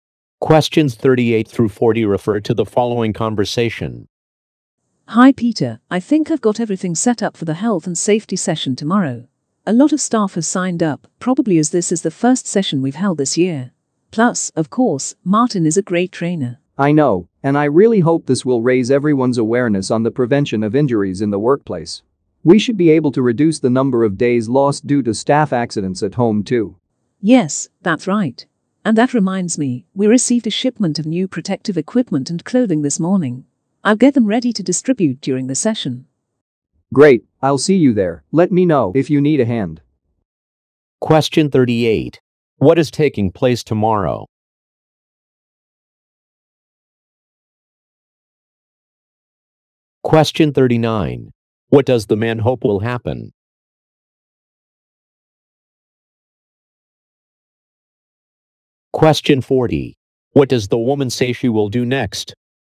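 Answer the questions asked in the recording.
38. A health and safety training session
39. Staff awareness of injury prevention will increase
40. Prepare the new protective equipment to distribute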